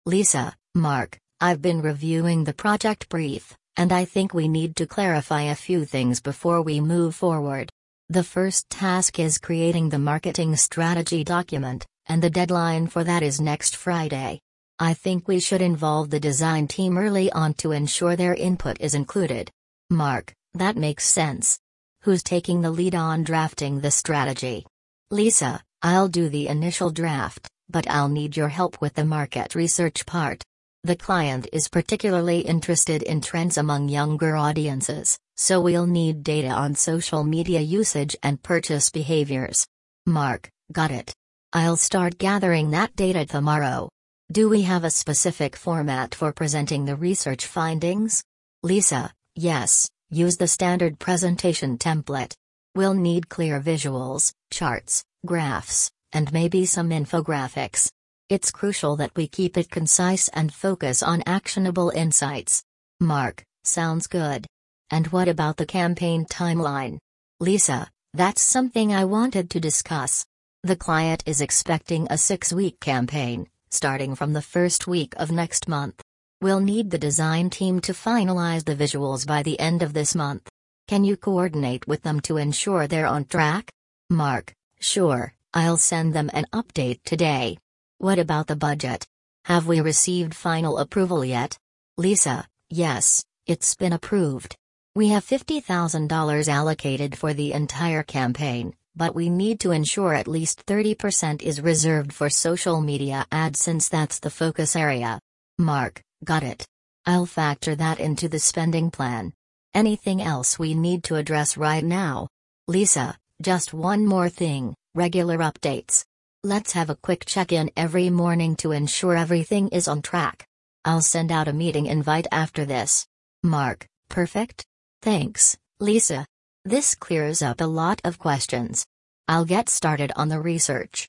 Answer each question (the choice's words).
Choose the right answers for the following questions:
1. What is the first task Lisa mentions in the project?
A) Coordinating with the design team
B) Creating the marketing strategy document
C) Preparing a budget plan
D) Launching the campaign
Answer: Creating the marketing strategy document

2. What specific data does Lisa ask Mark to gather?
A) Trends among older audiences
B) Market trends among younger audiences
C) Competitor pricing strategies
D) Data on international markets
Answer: Market trends among younger audiences

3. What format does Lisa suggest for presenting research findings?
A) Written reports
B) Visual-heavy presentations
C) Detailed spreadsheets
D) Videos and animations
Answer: Visual-heavy presentations

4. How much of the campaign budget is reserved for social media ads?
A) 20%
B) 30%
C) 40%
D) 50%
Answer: 30%

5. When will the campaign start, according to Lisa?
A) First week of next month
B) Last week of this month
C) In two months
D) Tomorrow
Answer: First week of next month